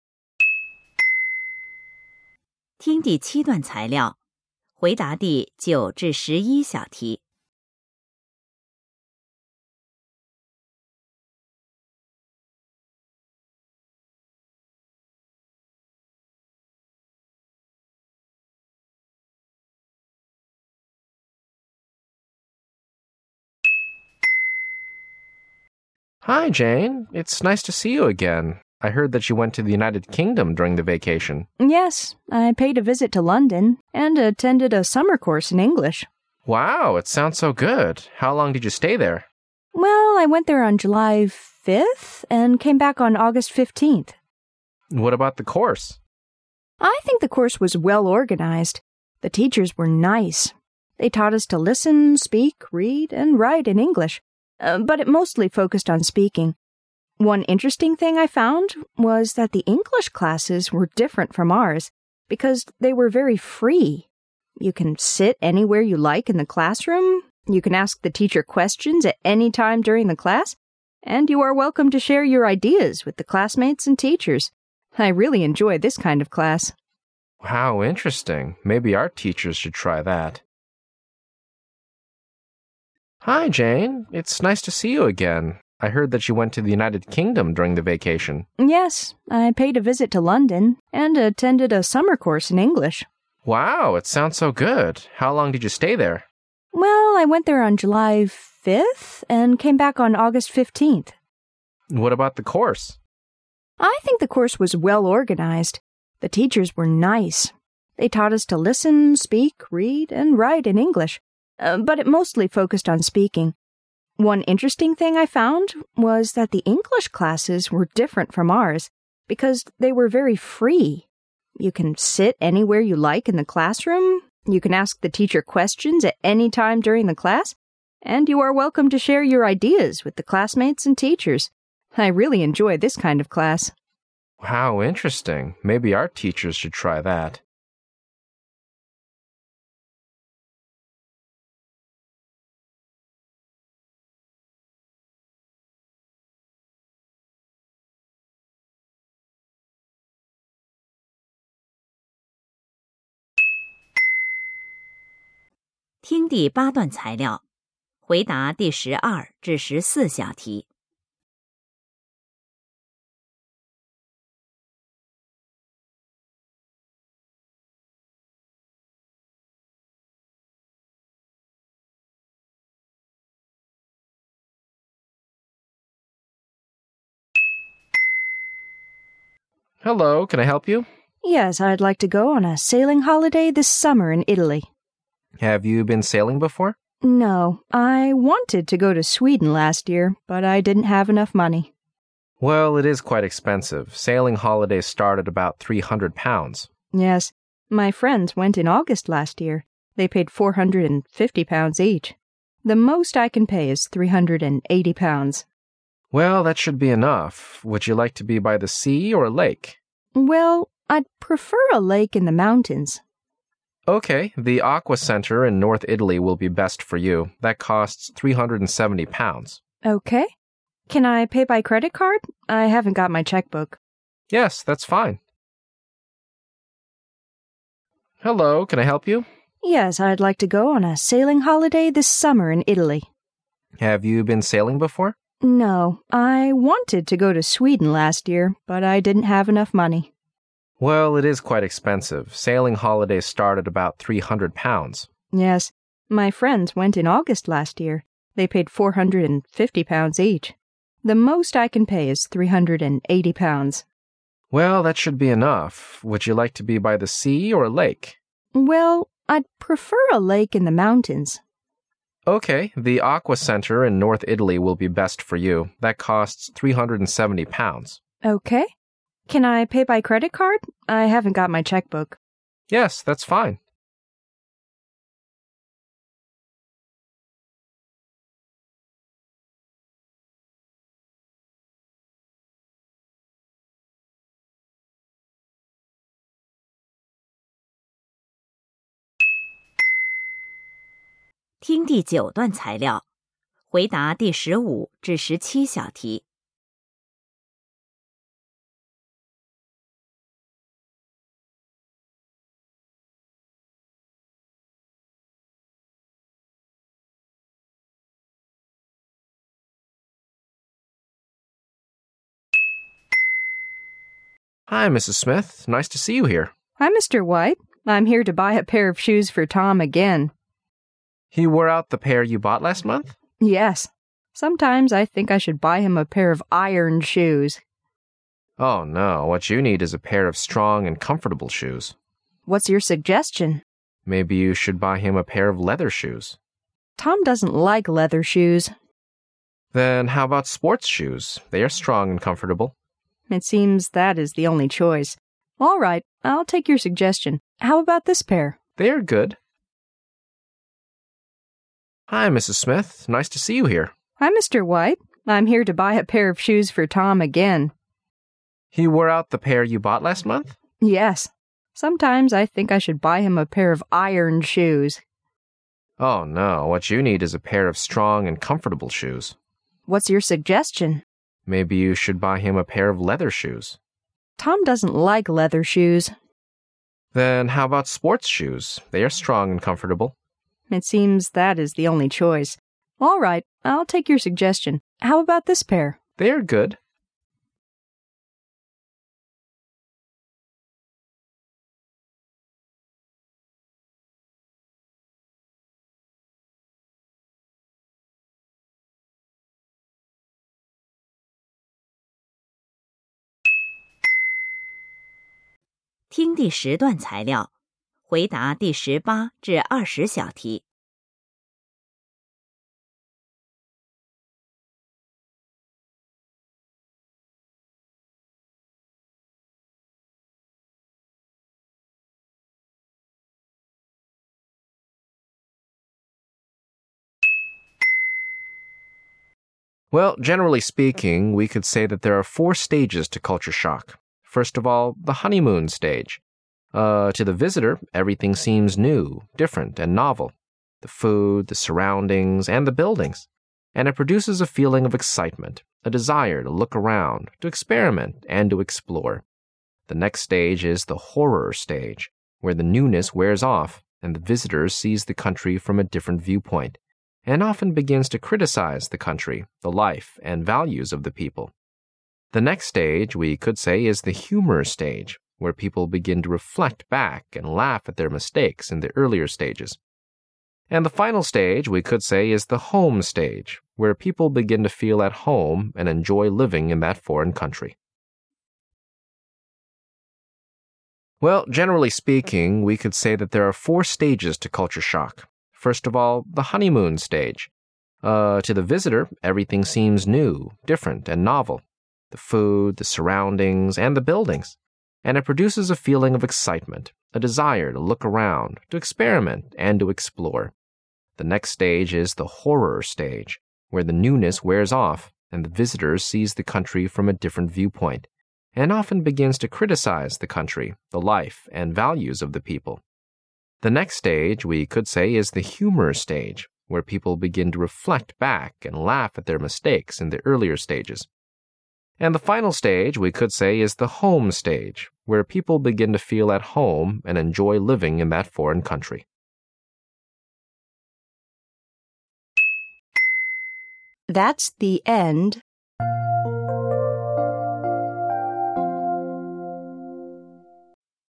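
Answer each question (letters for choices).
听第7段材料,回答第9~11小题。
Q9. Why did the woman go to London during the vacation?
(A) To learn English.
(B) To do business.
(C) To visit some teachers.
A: A

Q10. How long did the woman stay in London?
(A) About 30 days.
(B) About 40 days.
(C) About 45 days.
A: B

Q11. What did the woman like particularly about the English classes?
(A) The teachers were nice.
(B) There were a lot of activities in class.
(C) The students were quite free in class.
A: C

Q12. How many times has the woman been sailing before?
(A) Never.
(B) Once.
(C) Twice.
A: A

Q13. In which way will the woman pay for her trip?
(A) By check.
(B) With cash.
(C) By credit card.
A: C

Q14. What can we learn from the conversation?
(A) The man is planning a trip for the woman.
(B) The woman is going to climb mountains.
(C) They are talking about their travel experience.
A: A

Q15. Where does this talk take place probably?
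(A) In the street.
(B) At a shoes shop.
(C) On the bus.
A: B

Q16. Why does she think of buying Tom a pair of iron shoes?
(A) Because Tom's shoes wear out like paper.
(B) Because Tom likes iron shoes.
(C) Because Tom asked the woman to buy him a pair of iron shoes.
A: A

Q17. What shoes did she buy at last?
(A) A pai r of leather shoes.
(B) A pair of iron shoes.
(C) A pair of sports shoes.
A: C

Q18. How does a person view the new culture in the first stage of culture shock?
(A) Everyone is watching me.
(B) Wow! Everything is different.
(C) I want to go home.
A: B

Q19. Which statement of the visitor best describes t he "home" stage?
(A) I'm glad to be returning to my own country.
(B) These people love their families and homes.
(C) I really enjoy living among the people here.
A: C

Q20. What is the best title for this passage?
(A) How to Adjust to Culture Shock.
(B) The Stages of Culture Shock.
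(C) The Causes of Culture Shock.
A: B

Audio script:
M: Hi, Jane. It's nice to see you again. I heard that you went to the United Kingdom during the vacation.
W: Yes. I paid a visit to London and attended a summer course in English.
M: Wow. It sounds so good. How long did you stay there?
W: Well, I went there on July 5th and came back on August 15th.
M: What about the course?
W:I think the course was well organized. They taught us to listen, speak, read and write in English, but it mostly focused on speaking. One interesting thing I found was that the English classes were different from ours because they were very free. You can sit anywhere you like in the cl assroom. You can ask the teacher questions at any time during the class, and you are welcome to share your ideas with the classmates and teachers. I really enjoy this kind of class.
M: How interesting! Maybe our teachers should try that.
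听第8段材料,回答第12~14小题。
M: Hello, can I help you?
W: Yes, I'd like to go on a sailing holiday this summer in Italy.
M: Have you been sailing before?
W: No. I wanted to go to Sweden last year, but I didn't have enough money.
M: Well, it is quite expensive. Sailing holidays start at about three hundred pounds.
W: Yes, my friend s went in August last year. They paid four hundred and fifty pounds each. The most I can pay is three hundred and eighty pounds.
M: Well, that should be enough. Would you like to be by the sea or a lake?
W: Well, I' d prefer a lake in the mountains.
M: Okay. The Aqua Center in north Italy will be best for you. That costs £370.
W: Okay. Can I pay by credit card? I haven't got my checkbook.
M: Yes, that' s fine.
听第9段对话,回答第15~17小题。
M: Hi, Mrs. Smith. Nice to see you here.
W: Hi, Mr. White. I'm here to buy a pair of shoes for Tom again.
M: He wore out the pair you bought last month?
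W: Yes. Sometimes I think I should buy h im a pair of iron shoes.
M: Oh, no. What you need is a pair of strong and comfortable shoes.
W: What' s your suggestion?
M: Maybe you should buy him a pair of leather shoes.
W: Tom doesn' t like leather shoes.
M: Then, how about sports shoes? They are strong and comfortable.
W: It seems that is the only choice. All right. I'll take your suggestion. How about this pair?
M: They are good.
听第10段材料,回答第18~20小题。
Well, generally speaking, we could say that there are four stages to culture shock. First of all, the "honeymoon" stage. Uh, to the visitor, everything seems new, different, and novel. The food, the surroundings, and the buildings. And it produces a feeling of excitement: a desire to look around, to experiment, and to explore.
The next stage is the "horror" stag e, where the newness wears off, and the visitor sees the country from a different viewpoint, and often begins to criticize the cou ntry, the life, and values of the people.
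The next stage, we could say, is the "humor" stage, where people begin to reflect back and laugh at their mistakes in the earlier stages.
And the final stage, we could say, is the "home" stage, where people begin to feel at home and enj oy living in that foreign country.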